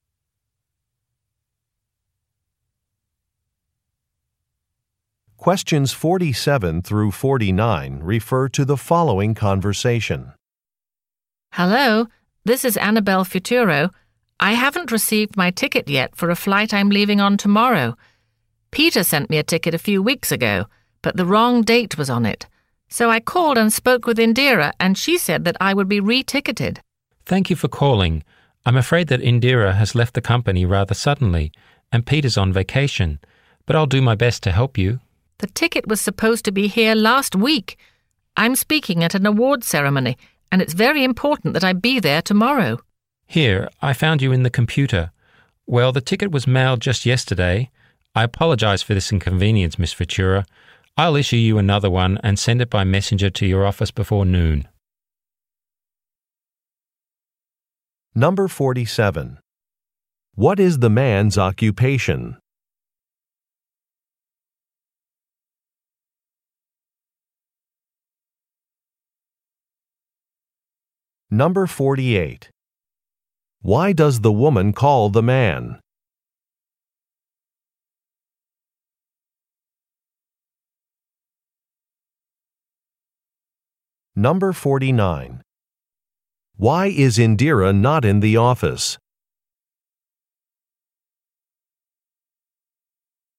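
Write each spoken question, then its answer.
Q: Why does the woman call the man?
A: She hasn't received her plane ticket

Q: Why is Indira not in the office?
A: She has left the company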